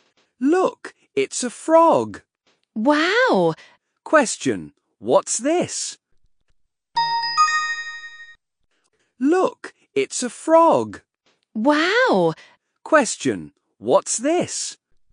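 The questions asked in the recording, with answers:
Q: Question, what's this?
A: a frog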